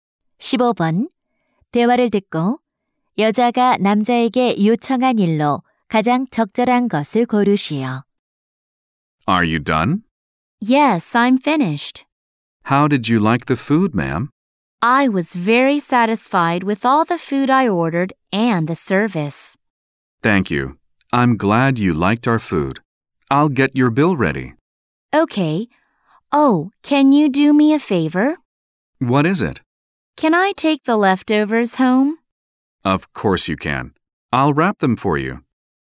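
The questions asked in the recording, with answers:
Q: 대화를 듣고 여자가 남자에게 요청한 일로 가장 적절한 것을 고르시오.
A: 남은 음식 포장하기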